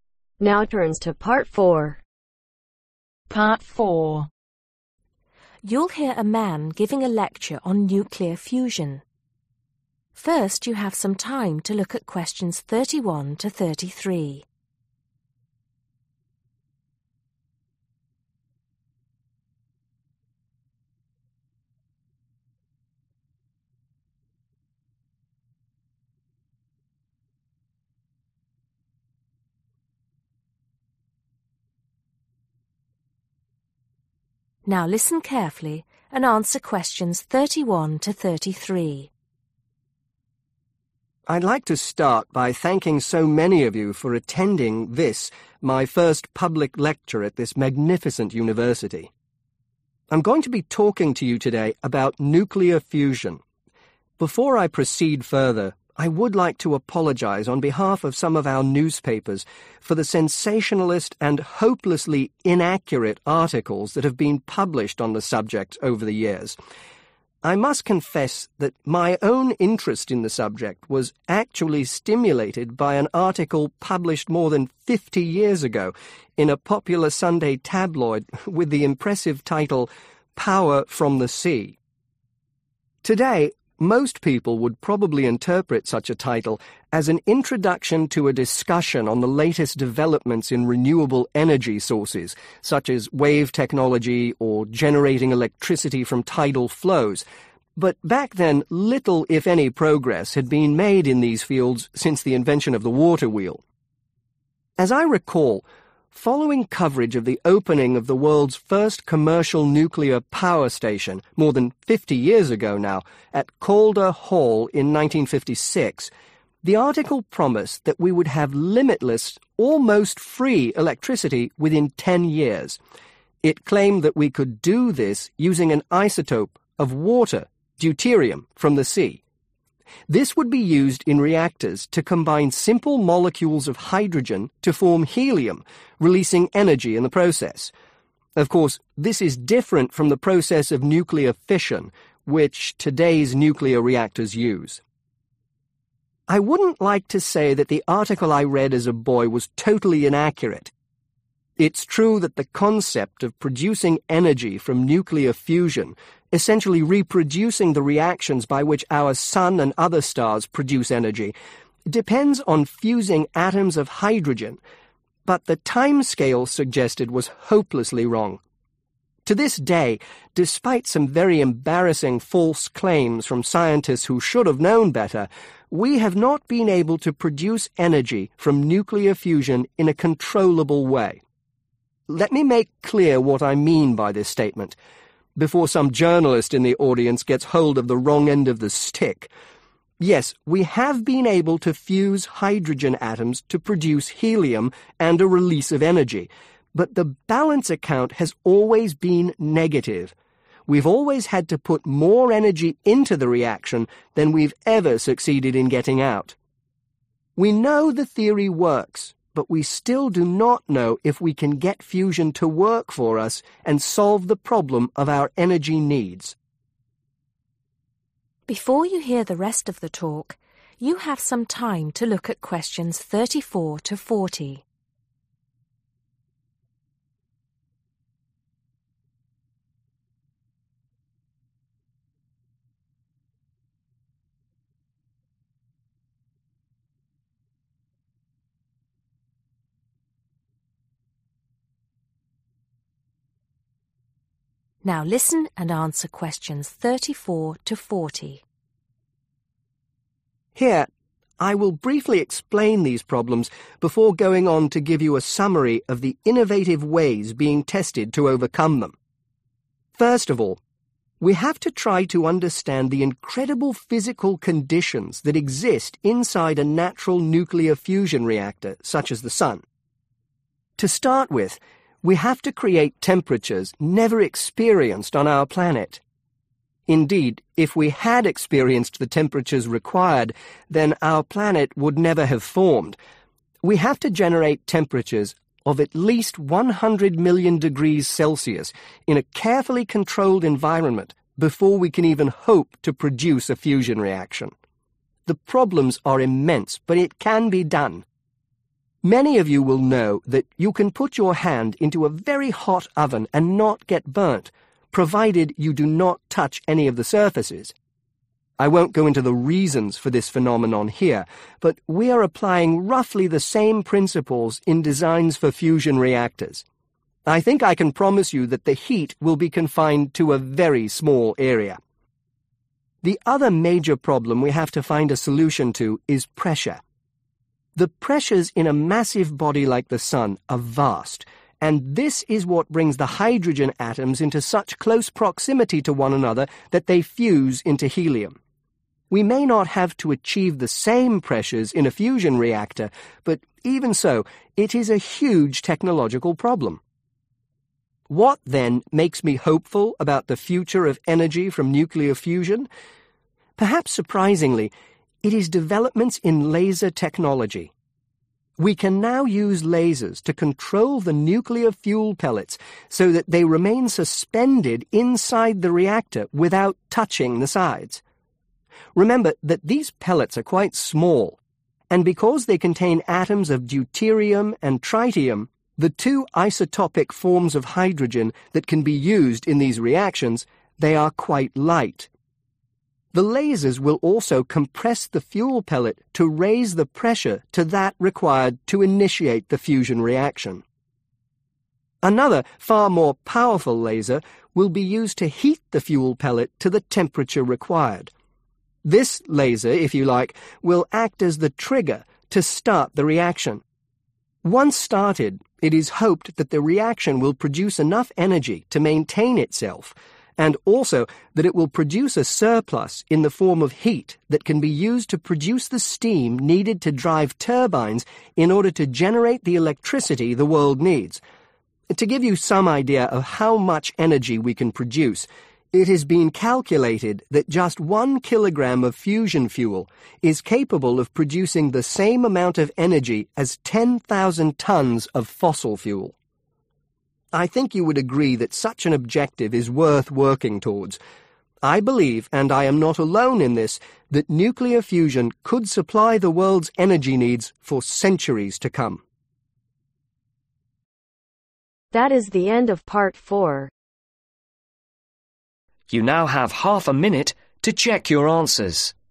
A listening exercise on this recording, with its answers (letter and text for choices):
Choose the correct letter A , B or C.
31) What does the speaker say about newspapers ?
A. They never report developments in science accurately.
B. He became interested in his subject because of a newspaper report.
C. They only report development in renewable energy technology.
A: B. He became interested in his subject because of a newspaper report.

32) What significant event took place in 1956 ?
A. Scientists discovered a new source of energy.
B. A new type of power station came into service.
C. Helium was first produced from hydrogen.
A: B. A new type of power station came into service.

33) What does the speaker consider to be the main problem with nuclear fusion ?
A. Irresponsible scientists make false claims on the subject.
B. It takes too long to produce the required reaction.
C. The reaction has not produced usable quantities of energy.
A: C. The reaction has not produced usable quantities of energy.

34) Temperatures of a least ............ degrees are needed for fusion to take place.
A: 100 Million / 100000000

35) Creating the pressure required in a ............ is a major technological problem.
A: Fusion reactor

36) A number of (36)............ will suspend the fuel so that it does not come into contact with the sides of the (37)............ .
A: Lasers

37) A number of (36)............ will suspend the fuel so that it does not come into contact with the sides of the (37)............ .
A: Reactor

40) It is believed that amount of energy that can be produced from (40)............ of fusion fuel is equivalent to that which can be produced from 10,000 tones of fossil fuel.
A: 1/one kilogram/kg